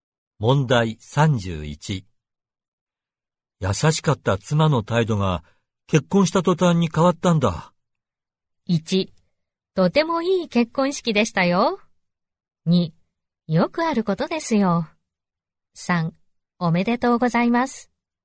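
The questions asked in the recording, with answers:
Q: 優しかった妻の態度が結婚した途端に変わったんだ。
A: 2: よくあることですよ。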